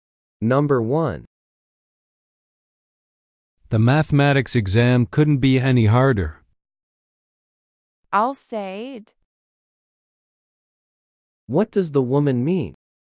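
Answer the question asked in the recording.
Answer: She agrees the mathematics exam was extremely hard.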